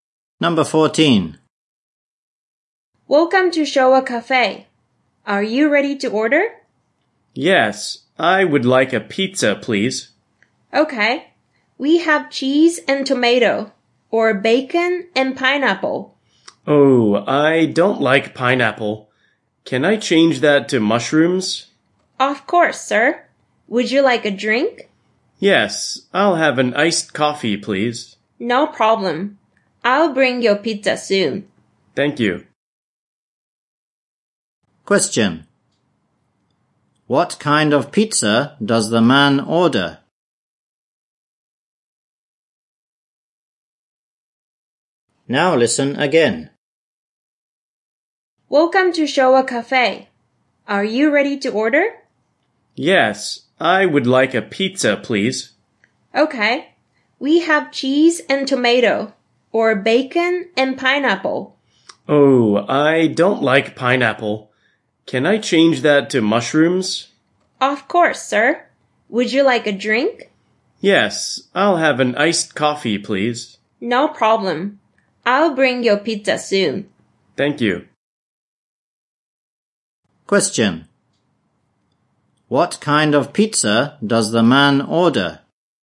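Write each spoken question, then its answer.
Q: What kind of pizza does the man order?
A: Bacon and mushroom pizza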